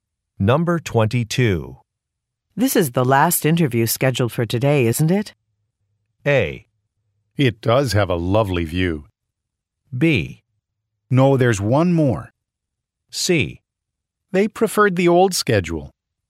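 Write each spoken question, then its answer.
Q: This is the last interview scheduled for today, isn't it?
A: B: No, there's one more.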